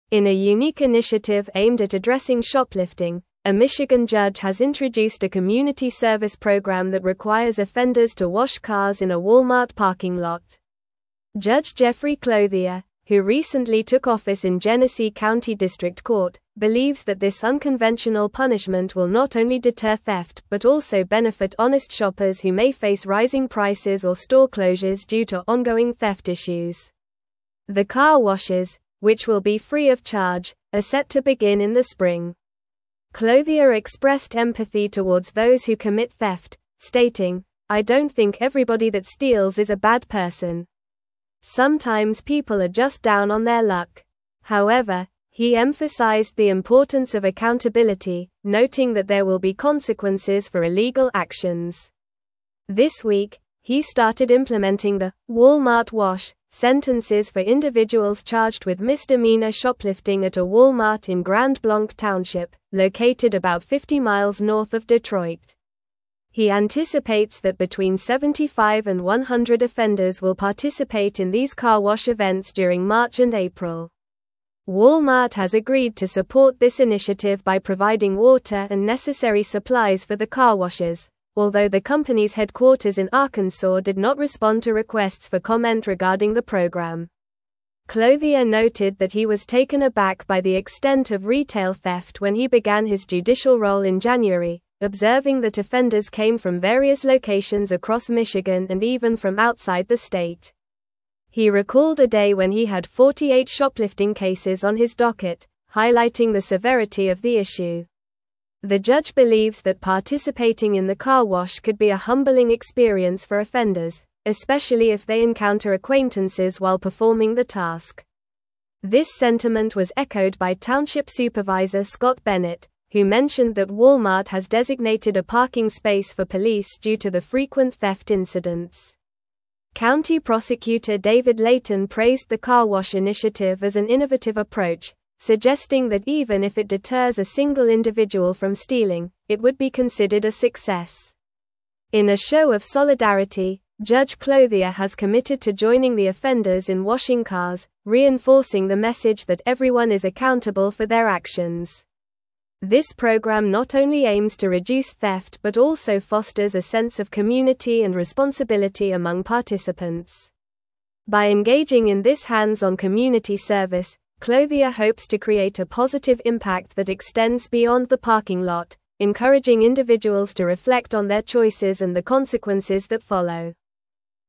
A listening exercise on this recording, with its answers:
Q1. In a unique initiative aimed at addressing shoplifting, a Michigan judge has introduced a community (1)______ program that requires offenders to wash cars in a Walmart parking lot.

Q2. Judge Jeffrey Clothier, who recently took office in Genesee County District Court, believes that this unconventional punishment will not only (2)______ theft but also benefit honest shoppers who may face rising prices or store closures due to ongoing theft issues.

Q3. Clothier (3)______ empathy towards those who commit theft, (4)______, "I don't think everybody that steals is a bad person.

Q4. Clothier (3)______ empathy towards those who commit theft, (4)______, "I don't think everybody that steals is a bad person.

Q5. However, he emphasized the importance of accountability, noting that there will be consequences for illegal (5)______.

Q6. This week, he started implementing the "Walmart wash" sentences for individuals (6)______ with misdemeanor shoplifting at a Walmart in (7)______ Blanc Township, located about 50 miles north of Detroit.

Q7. This week, he started implementing the "Walmart wash" sentences for individuals (6)______ with misdemeanor shoplifting at a Walmart in (7)______ Blanc Township, located about 50 miles north of Detroit.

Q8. Walmart has agreed to support this initiative by providing water and necessary supplies for the car washes, although the company's headquarters in Arkansas did not (8)______ to requests for comment regarding the program.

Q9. Clothier noted that he was taken aback by the extent of retail theft when he began his judicial role in January, observing that offenders came from various (9)______ across Michigan and even from outside the (10)______.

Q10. Clothier noted that he was taken aback by the extent of retail theft when he began his judicial role in January, observing that offenders came from various (9)______ across Michigan and even from outside the (10)______.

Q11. The judge believes that (11)______ in the car wash could be a humbling experience for offenders, especially if they encounter acquaintances while performing the task.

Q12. This sentiment was echoed by township Supervisor Scott Bennett, who mentioned that (12)______ has designated a parking space for police due to the frequent theft incidents.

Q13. County Prosecutor David Leyton praised the car wash initiative as an innovative approach, (13)______ that even if it deters a single (14)______ from stealing, it would be considered a success.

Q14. County Prosecutor David Leyton praised the car wash initiative as an innovative approach, (13)______ that even if it deters a single (14)______ from stealing, it would be considered a success.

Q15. In a show of solidarity, (15)______ Clothier has committed to joining the offenders in washing cars, reinforcing the message that everyone is accountable for their actions.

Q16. This program not only aims to reduce theft but also fosters a sense of (16)______ and responsibility among participants.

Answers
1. service
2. deter
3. expressed
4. stating
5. actions
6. charged
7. Grand
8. respond
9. locations
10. state
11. participating
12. Walmart
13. suggesting
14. individual
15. Judge
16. community

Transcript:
In a unique initiative aimed at addressing shoplifting, a Michigan judge has introduced a community service program that requires offenders to wash cars in a Walmart parking lot. Judge Jeffrey Clothier, who recently took office in Genesee County District Court, believes that this unconventional punishment will not only deter theft but also benefit honest shoppers who may face rising prices or store closures due to ongoing theft issues. The car washes, which will be free of charge, are set to begin in the spring.
Clothier expressed empathy towards those who commit theft, stating, "I don't think everybody that steals is a bad person. Sometimes people are just down on their luck." However, he emphasized the importance of accountability, noting that there will be consequences for illegal actions. This week, he started implementing the "Walmart wash" sentences for individuals charged with misdemeanor shoplifting at a Walmart in Grand Blanc Township, located about 50 miles north of Detroit. He anticipates that between 75 and 100 offenders will participate in these car wash events during March and April.
Walmart has agreed to support this initiative by providing water and necessary supplies for the car washes, although the company's headquarters in Arkansas did not respond to requests for comment regarding the program. Clothier noted that he was taken aback by the extent of retail theft when he began his judicial role in January, observing that offenders came from various locations across Michigan and even from outside the state. He recalled a day when he had 48 shoplifting cases on his docket, highlighting the severity of the issue.
The judge believes that participating in the car wash could be a humbling experience for offenders, especially if they encounter acquaintances while performing the task. This sentiment was echoed by township Supervisor Scott Bennett, who mentioned that Walmart has designated a parking space for police due to the frequent theft incidents. County Prosecutor David Leyton praised the car wash initiative as an innovative approach, suggesting that even if it deters a single individual from stealing, it would be considered a success.
In a show of solidarity, Judge Clothier has committed to joining the offenders in washing cars, reinforcing the message that everyone is accountable for their actions. This program not only aims to reduce theft but also fosters a sense of community and responsibility among participants. By engaging in this hands-on community service, Clothier hopes to create a positive impact that extends beyond the parking lot, encouraging individuals to reflect on their choices and the consequences that follow.

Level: Level 4